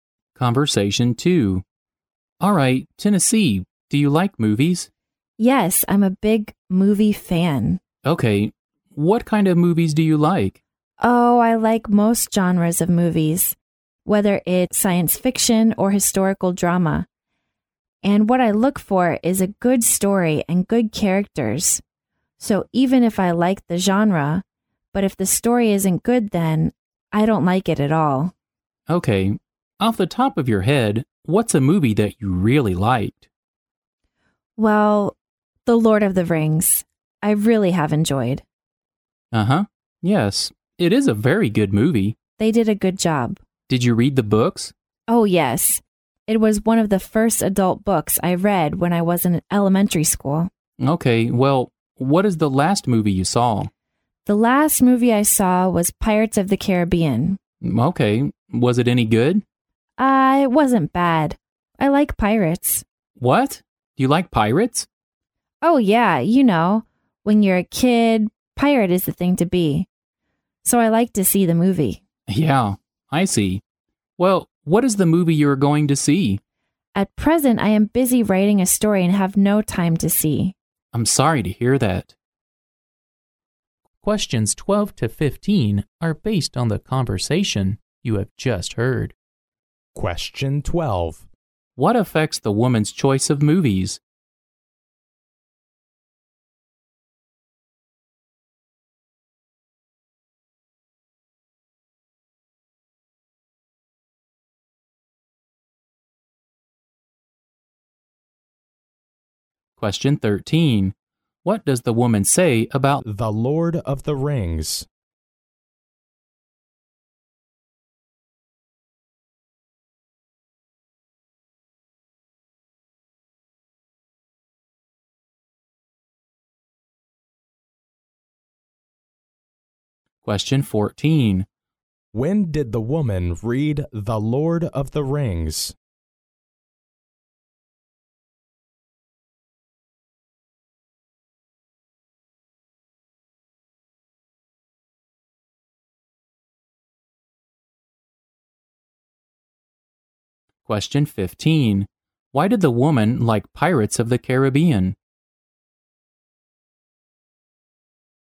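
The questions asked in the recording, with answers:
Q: What affects the woman's choice of movies?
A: A good story and good characters

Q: When did the woman read The Lord of the Rings?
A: When she was in elementary school

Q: Why did the woman like Pirates of the Caribbean?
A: She likes pirates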